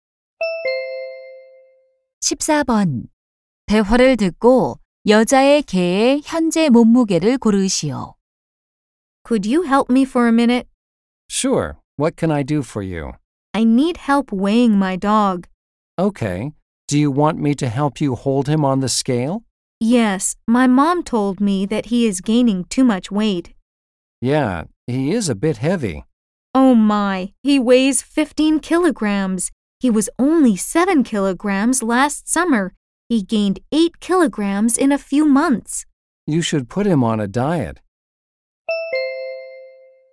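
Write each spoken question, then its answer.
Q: 대화를 듣고 여자의 개의 현재 몸무게를 고르시오.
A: 15킬로그램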